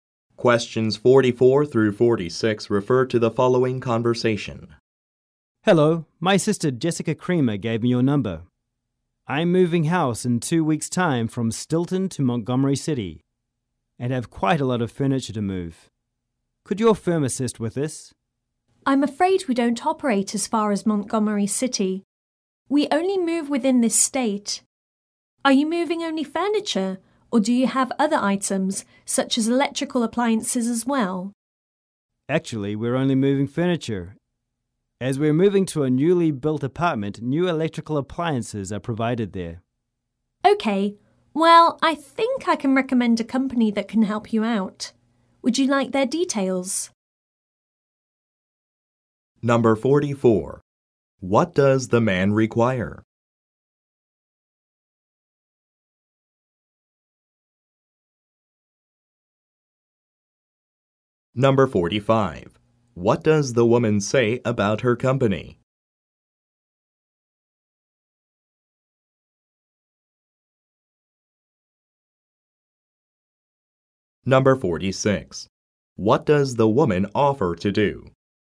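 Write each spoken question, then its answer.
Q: What does the man require?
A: Help moving his furniture to Montgomery City

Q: What does the woman say about her company?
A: It only moves within the state

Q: What does the woman offer to do?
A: Give him the details of another moving company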